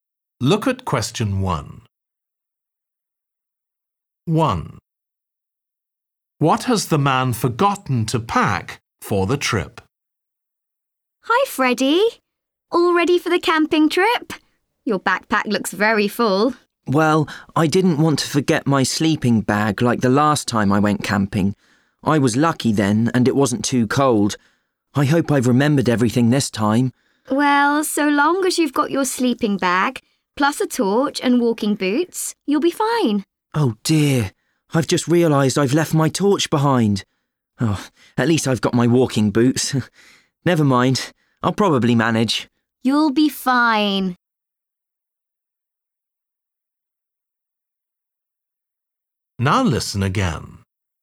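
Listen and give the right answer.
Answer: his torch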